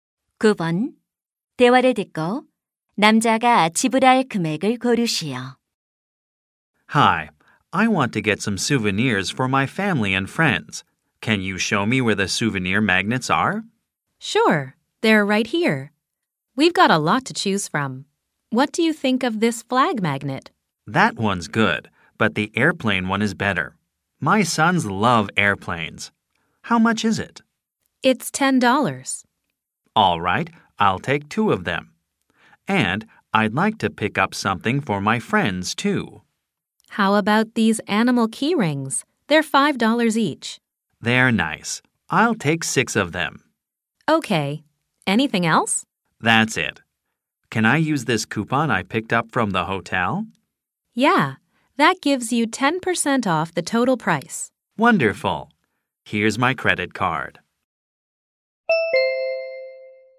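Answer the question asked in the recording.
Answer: 45달러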